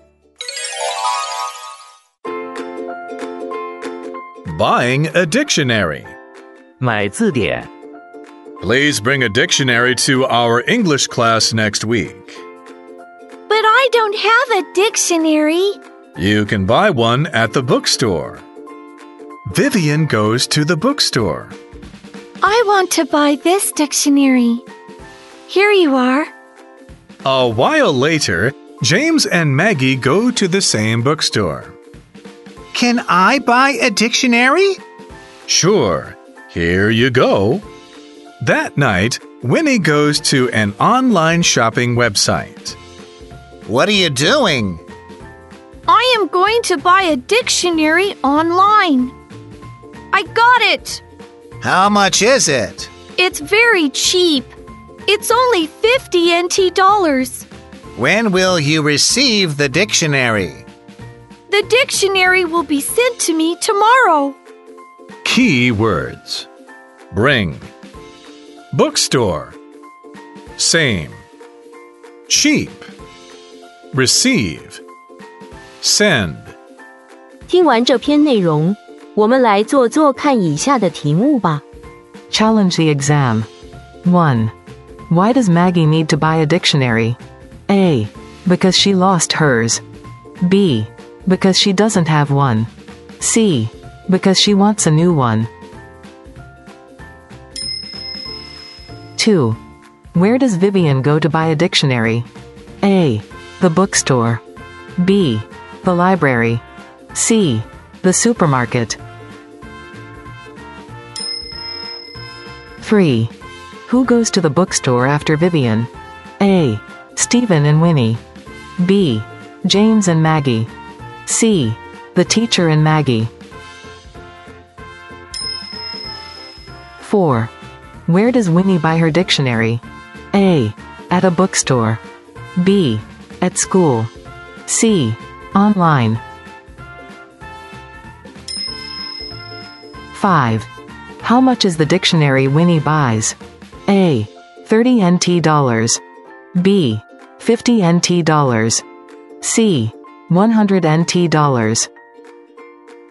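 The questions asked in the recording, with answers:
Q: Where does Vivian go to buy a dictionary?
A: A: The bookstore.

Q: Who goes to the bookstore after Vivian?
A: B: James and Maggie.

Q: Where does Winnie buy her dictionary?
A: C: Online.

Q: How much is the dictionary Winnie buys?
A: B: 50 NT dollars.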